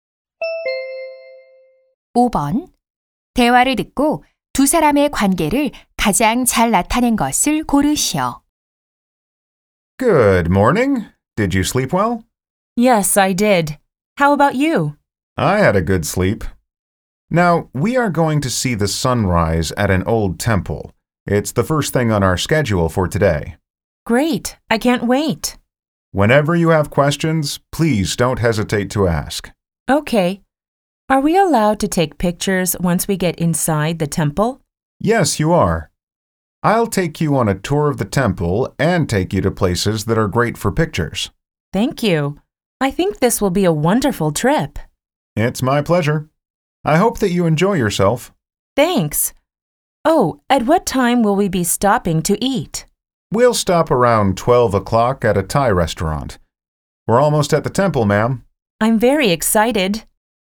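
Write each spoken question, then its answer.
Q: 대화를 듣고 두 사람의 관계를 가장 잘 나타낸 것을 고르시오.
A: 여행 가이드 - 관광객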